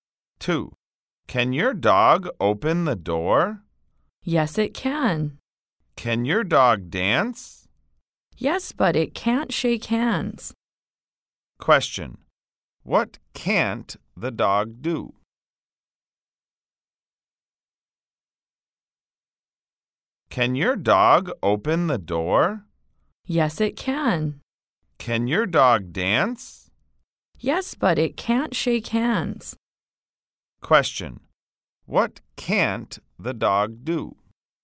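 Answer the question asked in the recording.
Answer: Shake hands.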